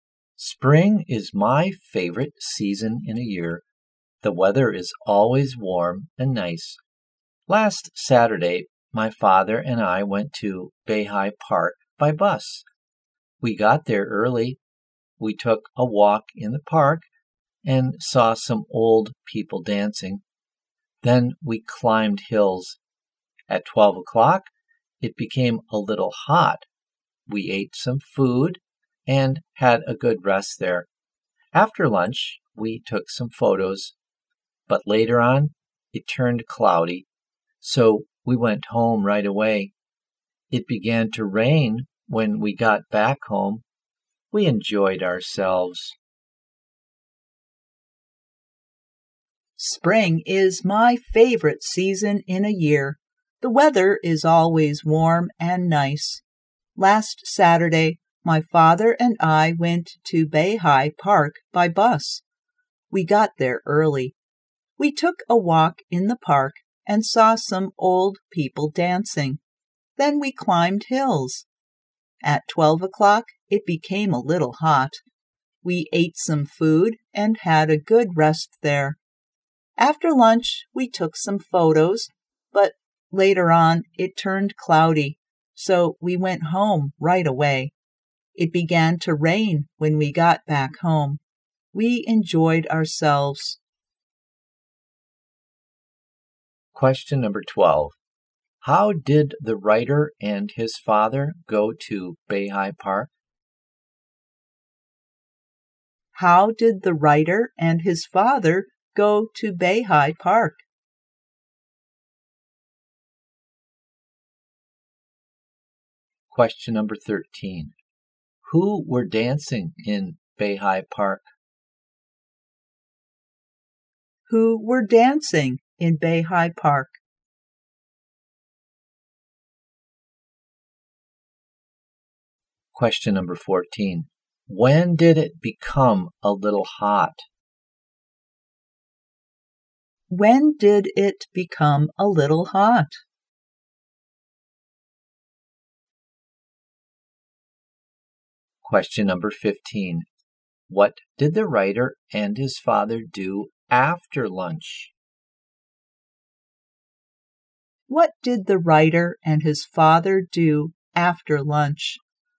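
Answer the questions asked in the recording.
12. By bus
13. Some old people
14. At 12 o'clock
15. They took some photos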